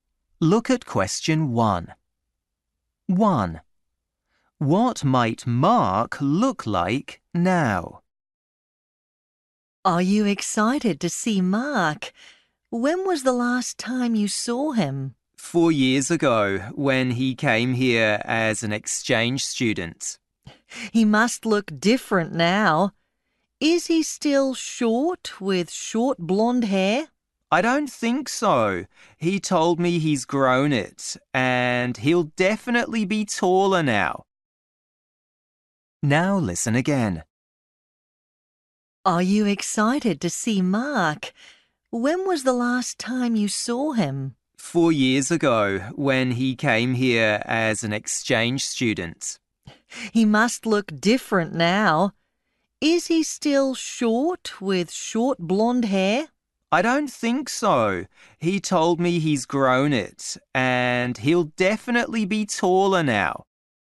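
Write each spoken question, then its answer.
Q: What might Mark look like now?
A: Tall with long blonde hair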